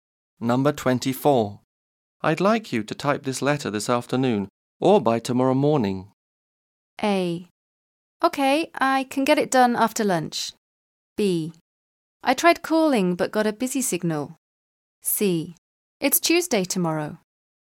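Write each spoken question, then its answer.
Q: I'd like you to type this letter this afternoon or by tomorrow morning.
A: A: Okay, I can get it done after lunch.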